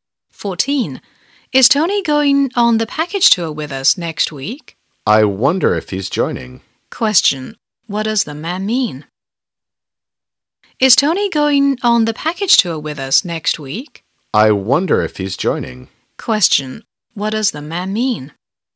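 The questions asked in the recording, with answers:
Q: what does the man mean?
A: He isn't sure if Tony is joining the tour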